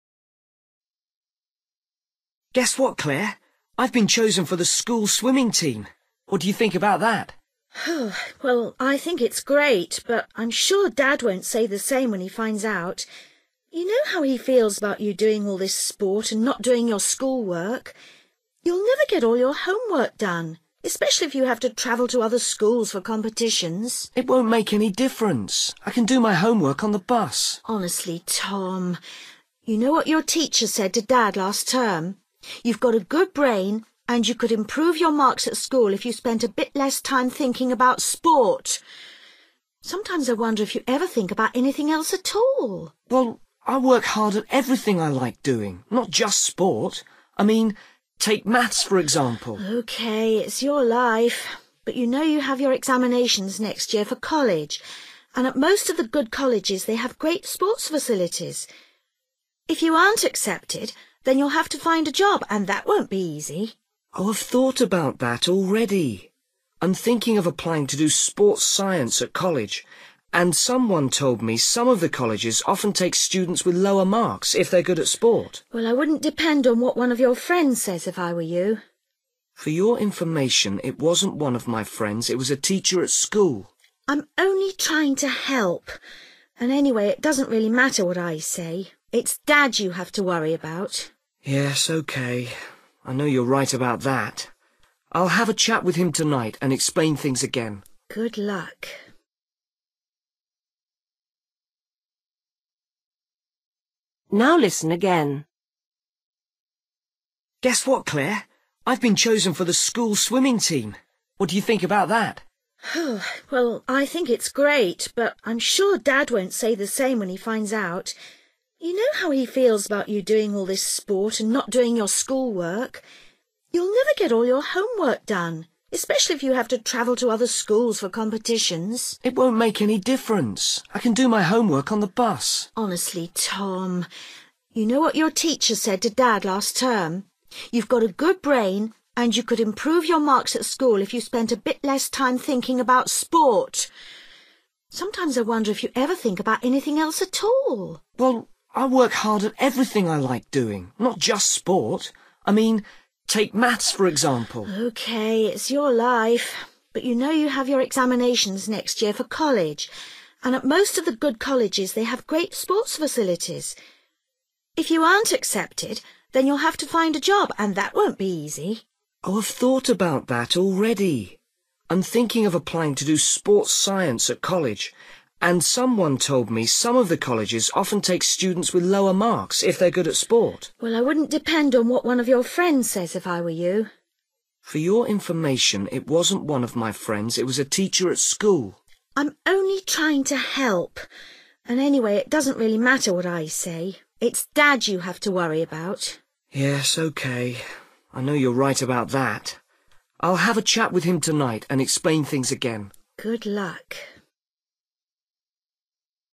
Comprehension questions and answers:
Decide if each sentence is correct or incorrect. If it is correct, choose the letter A for YES. If it is not correct, choose the letter B for NO.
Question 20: Clare thinks their father will be pleased by Tom's news.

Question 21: Tom believes he can manage both swimming and school work.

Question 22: Tom's teacher thinks Tom is clever.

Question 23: Tom dislikes doing maths.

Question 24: Clare thinks it is a bad idea to take a friend's advice.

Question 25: Tom finally realises he will need his father's agreement to his plans.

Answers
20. NO
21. YES
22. YES
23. NO
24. YES
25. YES

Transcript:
I've been chosen for the school swimming team! What do you think about that?
Girl: Well, I think it's great, but I'm sure Dad won't say the same when he finds out. You know how he feels about you doing all this sport and not doing your school work. You'll never get all your homework done, especially if you have to travel to other schools for competitions.
Boy: It won't make any difference. I can do my homework on the bus.
Girl: Honestly Tom, you know what your teacher said to Dad last term. You've got a good brain and you could improve your marks at school if you spent a bit less time thinking about sport. Sometimes I wonder if you ever think about anything else at all.
Boy: Well, I work hard at everything I like doing, not just sport. I mean, take maths for example.
Girl: Okay, it's your life, but you know you have your examinations next year for college, and at most of the good colleges they have great sports facilities. If you aren't accepted, then you'll have to find a job and that won't be easy.
Boy: Oh I've thought about that already. I'm thinking of applying to do Sports Science at college and someone told me some of the colleges often take students with lower marks if they're good at sport.
Girl: Well, I wouldn't depend on what one of your friends says if I were you.
Boy: For your information it wasn't one of my friends, it was a teacher at school.
Girl: I'm only trying to help and anyway it doesn't really matter what I say, it's Dad you have to worry about.
Boy: Yes, okay. I know you're right about that. I'll have a chat with him tonight and explain things again.
Girl: Good luck!

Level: B1